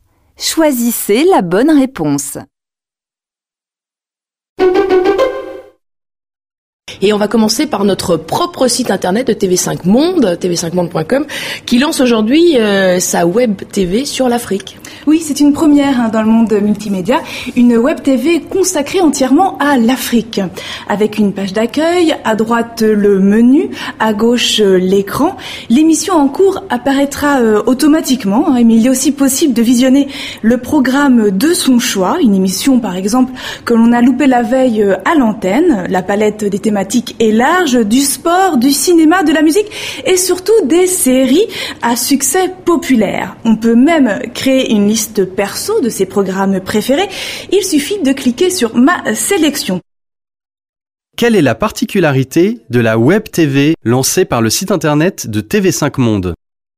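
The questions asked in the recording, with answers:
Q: Quelle est la particularité de la Web TV lancée par le site internet de TV5 Monde ?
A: Elle est entièrement consacrée à l'Afrique.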